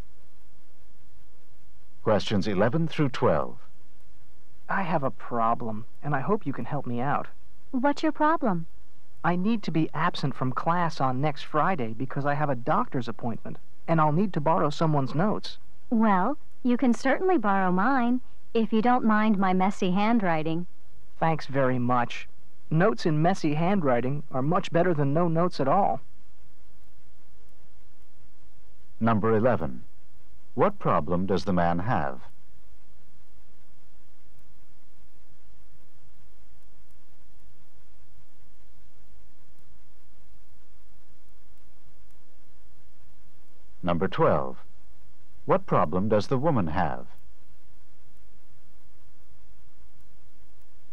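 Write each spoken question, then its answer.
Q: What problem does the man have?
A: He will miss class next Friday for a doctor's appointment and needs to borrow notes.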